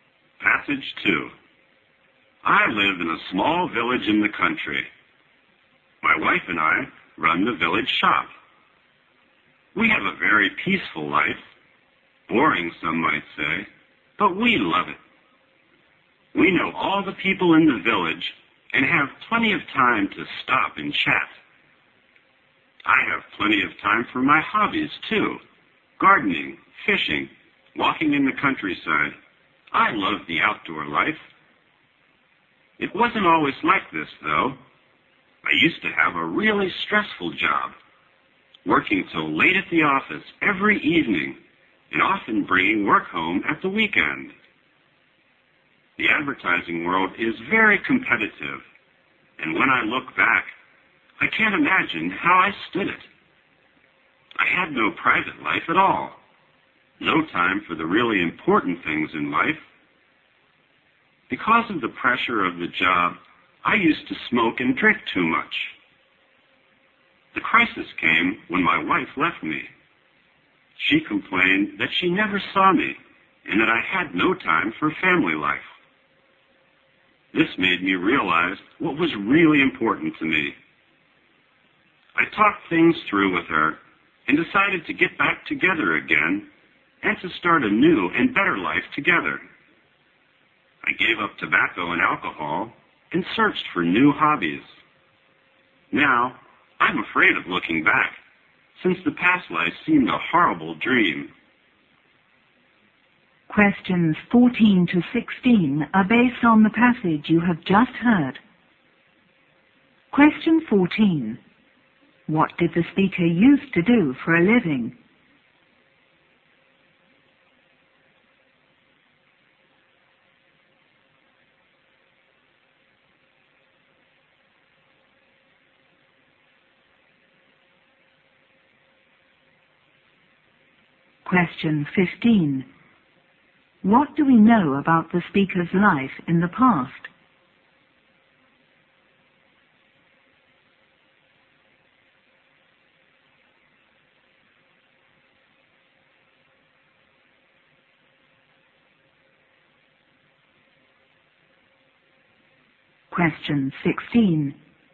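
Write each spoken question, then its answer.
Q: What did the speaker used to do for a living?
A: He worked in advertising

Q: What do we know about the speaker's life in the past?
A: It was stressful with no private life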